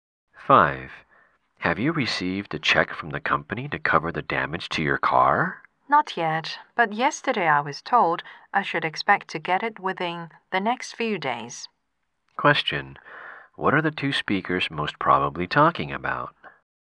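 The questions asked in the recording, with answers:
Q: What are the two speakers most probably talking about?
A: Compensation for damage to the woman's car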